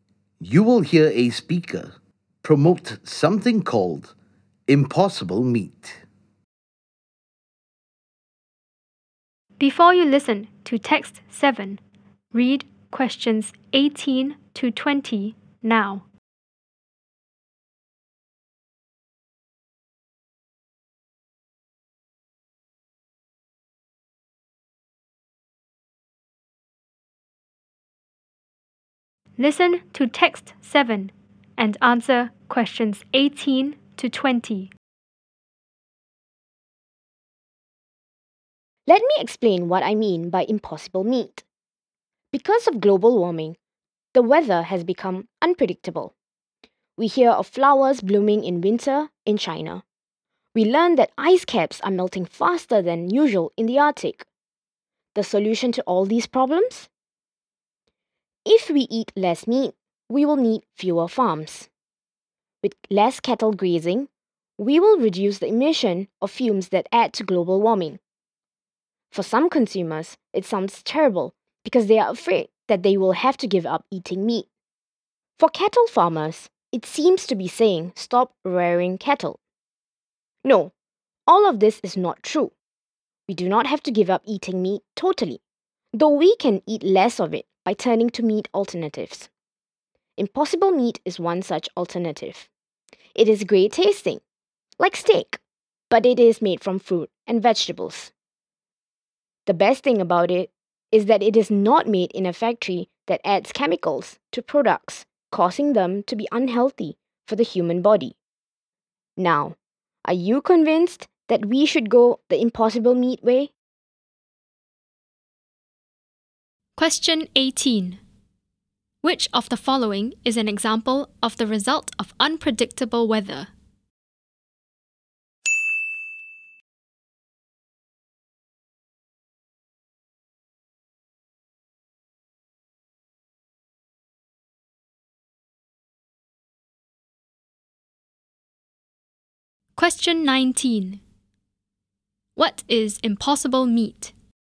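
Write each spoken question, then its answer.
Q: Which of the following is an example of the result of unpredictable weather?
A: Flowers blooming in winter in China (or ice caps melting faster in the Arctic)

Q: What is impossible meat?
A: A meat alternative made from fruit and vegetables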